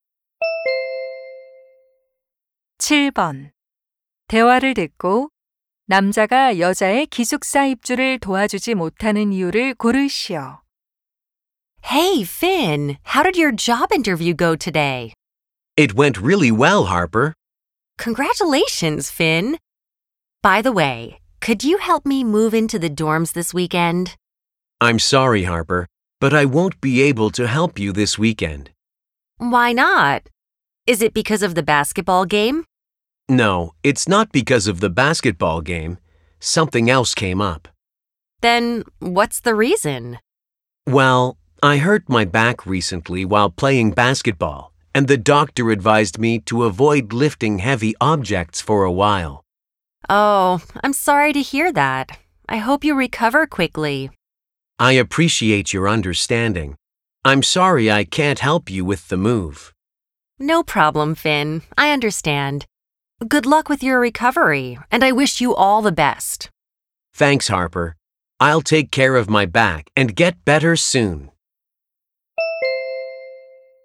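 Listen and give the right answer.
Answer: 허리를 다쳐서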